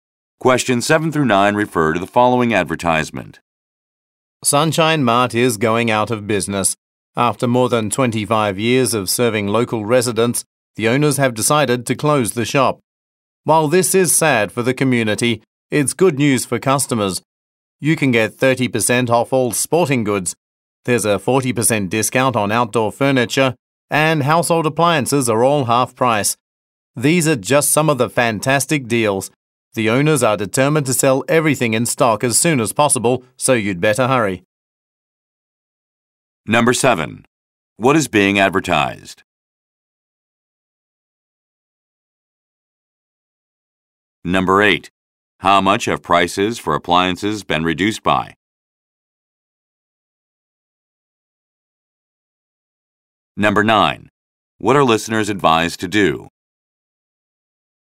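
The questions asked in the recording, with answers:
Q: What is being advertised?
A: A closing-down sale at Sunshine Mart

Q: How much have prices for appliances been reduced by?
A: 50% (half price)

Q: What are listeners advised to do?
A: Hurry to the store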